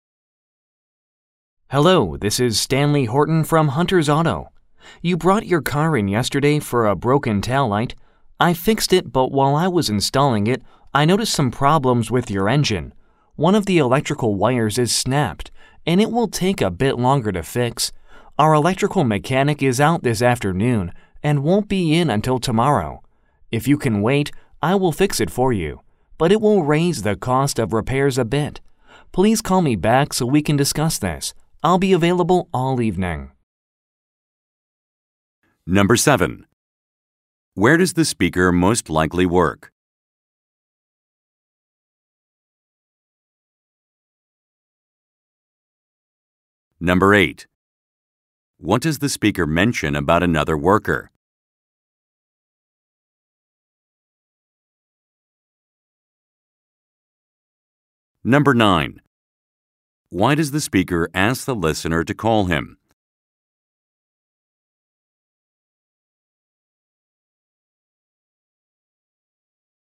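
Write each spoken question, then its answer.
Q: Where does the speaker most likely work?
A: At an auto repair shop

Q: What does the speaker mention about another worker?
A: The electrical mechanic is out this afternoon and won't be in until tomorrow

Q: Why does the speaker ask the listener to call him?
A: To discuss the extra engine repair and its cost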